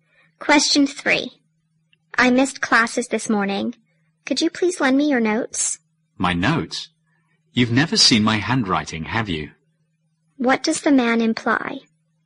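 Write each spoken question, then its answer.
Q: What does the man imply?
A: His handwriting is hard to read.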